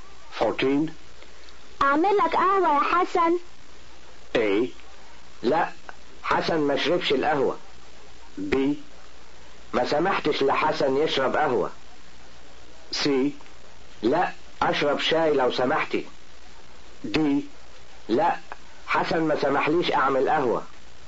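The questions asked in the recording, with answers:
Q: اعمل لك قهوة يا حسن.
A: C: لا اشرب شاي لو سمحتي.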